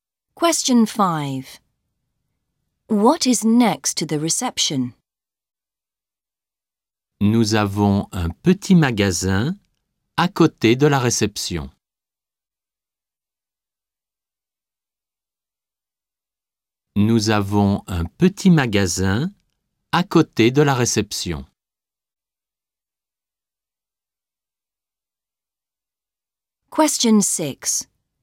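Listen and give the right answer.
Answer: A small shop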